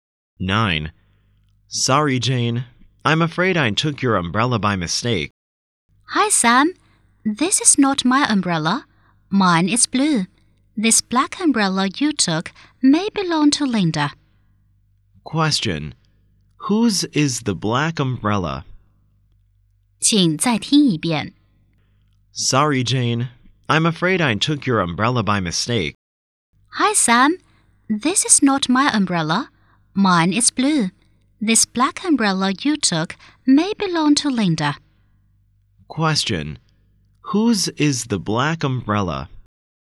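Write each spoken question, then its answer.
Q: Question. Whose is the black umbrella?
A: Probably Linda's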